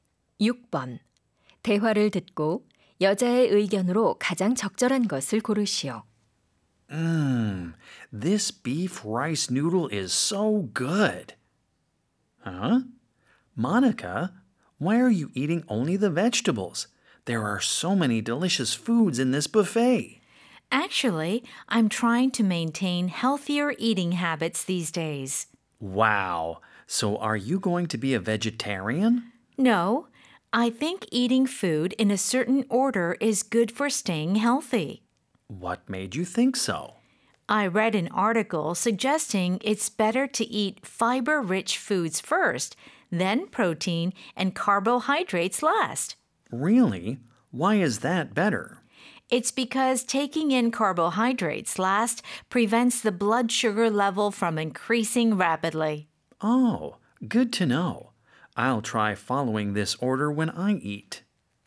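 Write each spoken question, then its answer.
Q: 대화를 듣고 여자의 의견으로 가장 적절한 것을 고르시오.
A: 음식을 정해진 순서대로 먹는 것이 건강에 좋다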